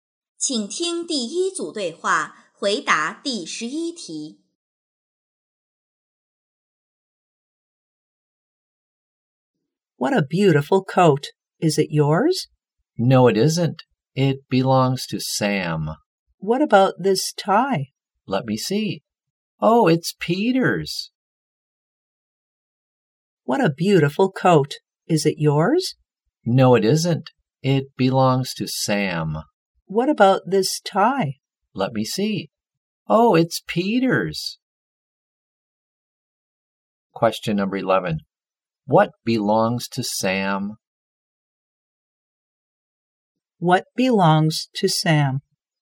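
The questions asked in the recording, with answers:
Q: What belongs to Sam?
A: The coat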